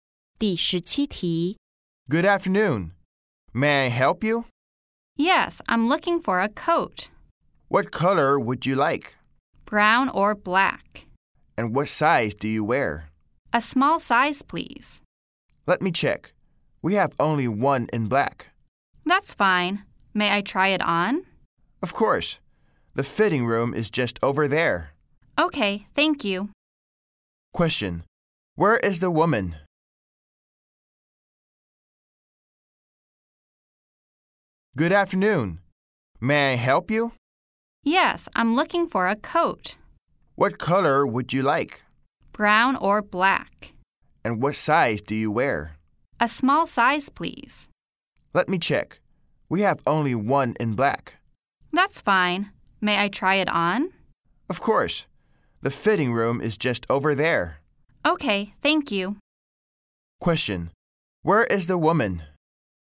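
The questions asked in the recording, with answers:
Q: Where is the woman?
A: In a clothing store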